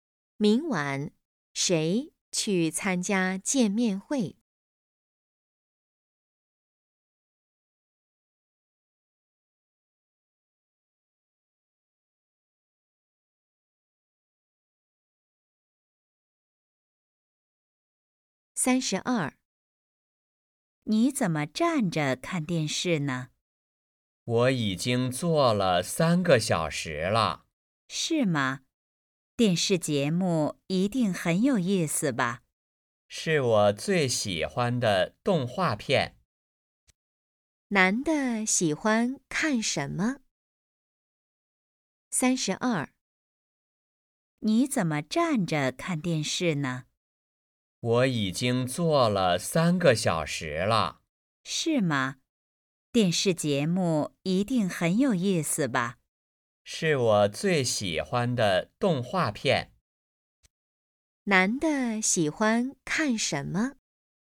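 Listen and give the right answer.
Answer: 动画片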